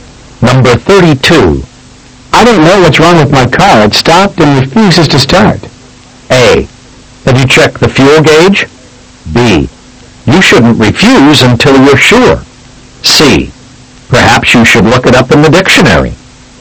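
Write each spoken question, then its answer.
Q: I don't know what's wrong with my car.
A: A: Have you checked the fuel gauge?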